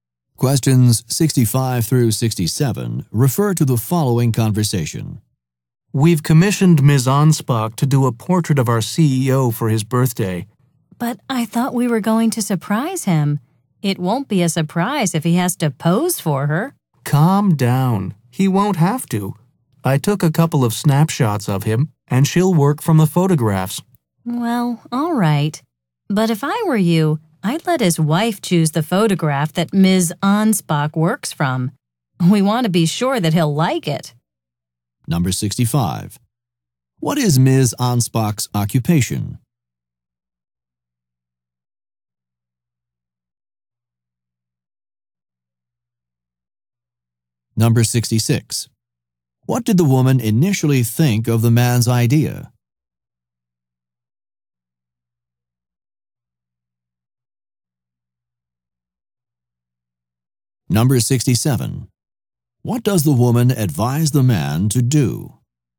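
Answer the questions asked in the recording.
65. Portrait painter
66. She thought it wouldn't be a surprise
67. Let the CEO's wife choose the photograph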